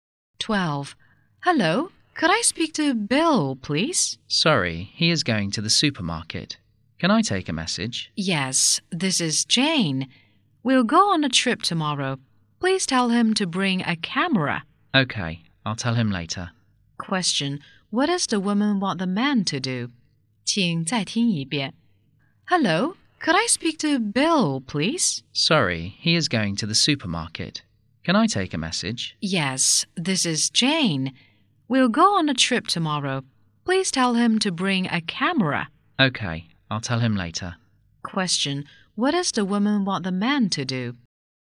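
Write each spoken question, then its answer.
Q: what does the woman want the man to do?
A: Tell Bill to bring a camera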